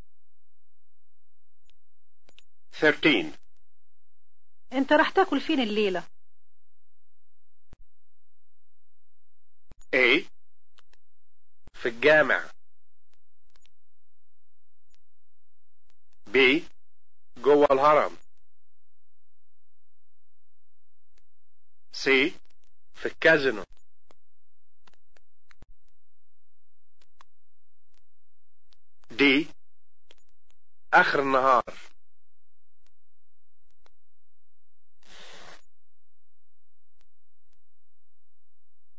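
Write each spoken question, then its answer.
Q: أنت راح تأكل فين الليلة؟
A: C: في الكازينو.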